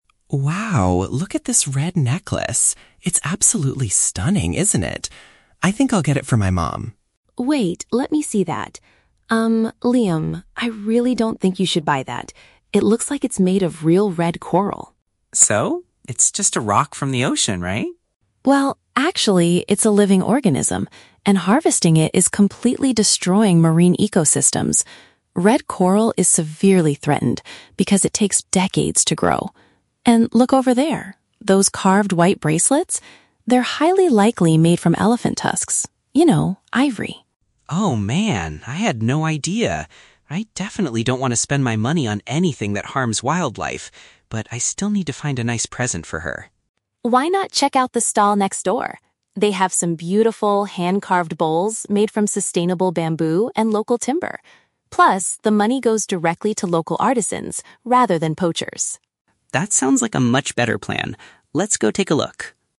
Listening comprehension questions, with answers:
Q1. Why does Emma advise Liam against buying the red necklace?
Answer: Collecting the material causes significant damage to the underwater environment.

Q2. How does Liam react when he learns the truth about the materials?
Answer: He is willing to find a gift that doesn't negatively impact animals.

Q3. What is one reason Emma recommends the neighboring stall?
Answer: The goods are created from environmentally friendly resources.

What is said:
Liam: Wow, look at this red necklace. It's absolutely stunning, isn't it? I think I'll get it for my mom.
Emma: Wait, let me see that. Um... Liam, I really don't think you should buy that. It looks like it's made of real red coral.
Liam: So? It's just a rock from the ocean, right?
Emma: Well, actually, it's a living organism, and harvesting it is completely destroying marine ecosystems. Red coral is severely threatened because it takes decades to grow. And look over there... those carved white bracelets? They're highly likely made from elephant tusks. You know, ivory.
Liam: Oh, man. I had no idea. I definitely don't want to spend my money on anything that harms wildlife. But I still need to find a nice present for her.
Emma: Why not check out the stall next door? They have some beautiful, hand-carved bowls made from sustainable bamboo and local timber. Plus, the money goes directly to local artisans rather than poachers.
Liam: That sounds like a much better plan. Let's go take a look.